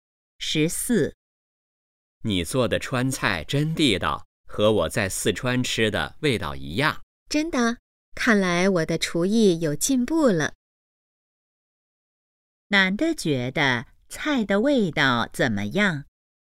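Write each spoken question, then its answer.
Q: 男的觉得菜的味道怎么样?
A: 很地道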